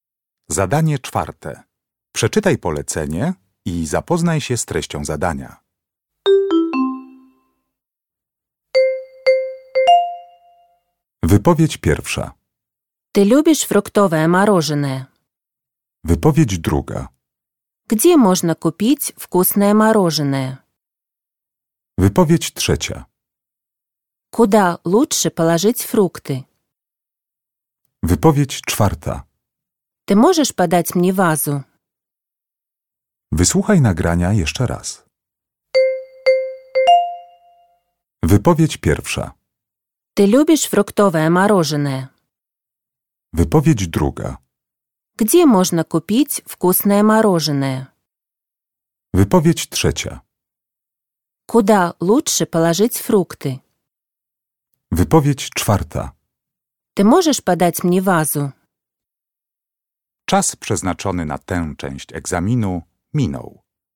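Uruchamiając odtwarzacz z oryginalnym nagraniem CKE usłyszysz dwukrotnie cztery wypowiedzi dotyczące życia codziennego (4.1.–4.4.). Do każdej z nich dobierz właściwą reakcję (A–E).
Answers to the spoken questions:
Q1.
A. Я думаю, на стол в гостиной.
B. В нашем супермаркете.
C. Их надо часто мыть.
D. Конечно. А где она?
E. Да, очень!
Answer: E. Да, очень!
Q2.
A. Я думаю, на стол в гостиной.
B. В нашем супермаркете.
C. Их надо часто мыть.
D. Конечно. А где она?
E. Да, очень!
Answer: B. В нашем супермаркете.
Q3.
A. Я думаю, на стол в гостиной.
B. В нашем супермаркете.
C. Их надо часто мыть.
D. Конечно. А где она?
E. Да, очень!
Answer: A. Я думаю, на стол в гостиной.
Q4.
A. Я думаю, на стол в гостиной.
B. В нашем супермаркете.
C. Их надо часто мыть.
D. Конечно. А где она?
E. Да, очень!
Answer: D. Конечно. А где она?

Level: egzamin ósmoklasisty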